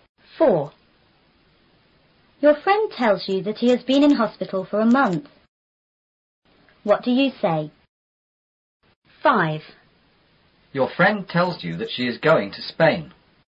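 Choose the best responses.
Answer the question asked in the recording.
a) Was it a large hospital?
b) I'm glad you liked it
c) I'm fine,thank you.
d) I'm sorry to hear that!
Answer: d) I'm sorry to hear that!

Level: 初中英语广州版4B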